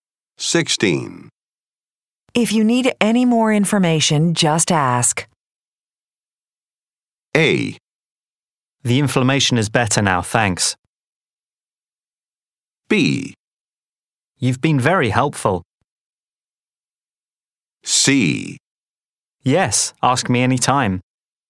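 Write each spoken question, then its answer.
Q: If you need any more information, just ask.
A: B: You've been very helpful.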